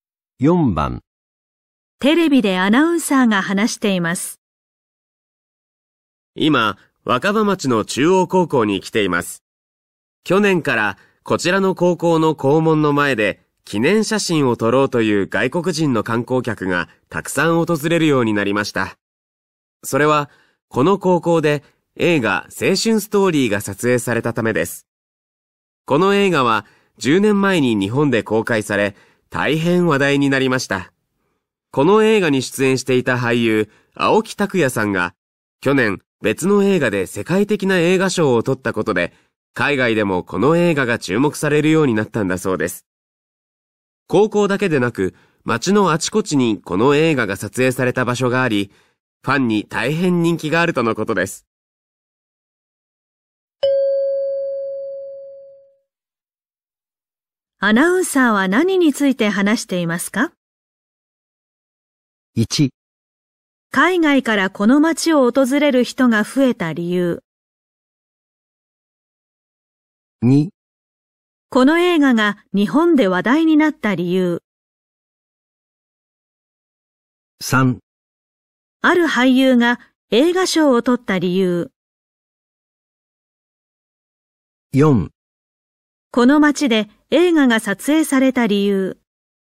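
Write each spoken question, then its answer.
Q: アナウンサーは何について話していますか?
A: 1: 海外からこの町を訪れる人が増えた理由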